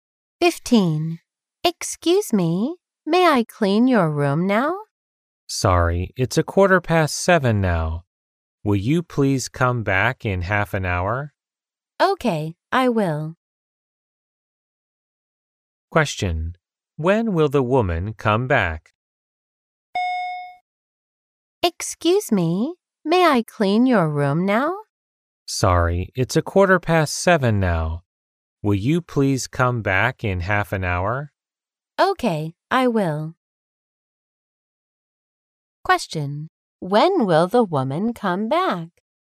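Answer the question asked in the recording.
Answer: At 7:45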